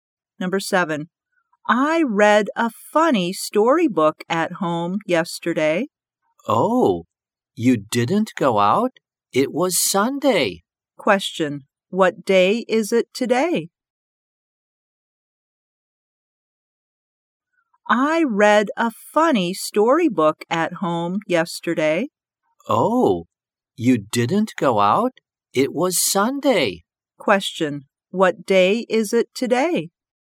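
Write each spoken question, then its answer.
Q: what day is it today?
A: Monday.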